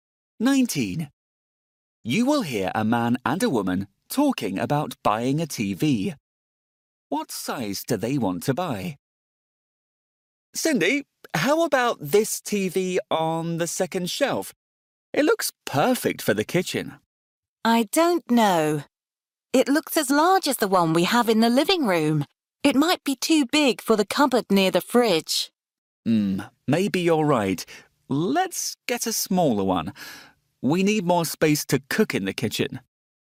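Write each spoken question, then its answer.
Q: What size do they want to buy?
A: A smaller one than the living room TV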